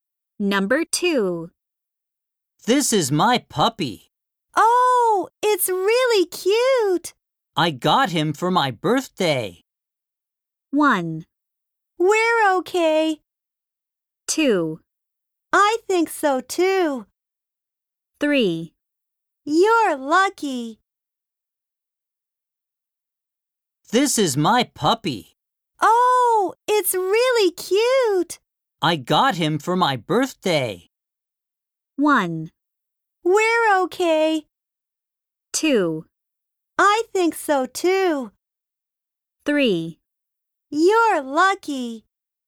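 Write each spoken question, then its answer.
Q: I got him for my birthday.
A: 3: You're lucky.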